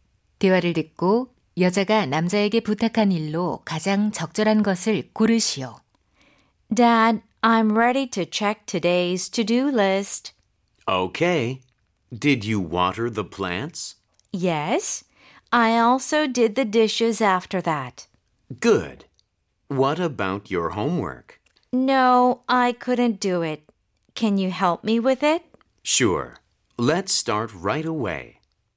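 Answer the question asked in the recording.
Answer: 숙제 도와주기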